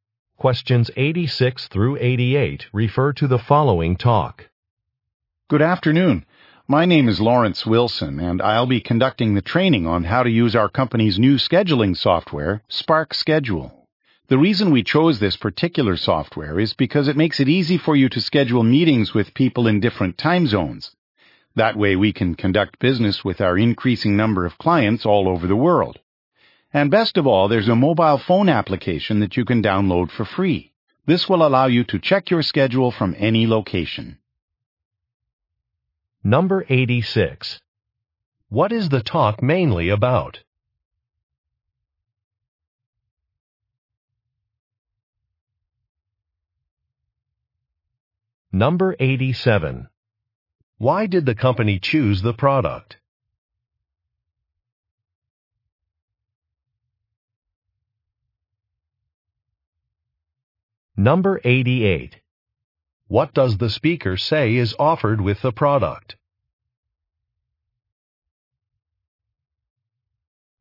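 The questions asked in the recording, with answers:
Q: What is the talk mainly about?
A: Training on new scheduling software

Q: Why did the company choose the product?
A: It makes scheduling meetings across time zones easy

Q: What does the speaker say is offered with the product?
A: A free mobile phone app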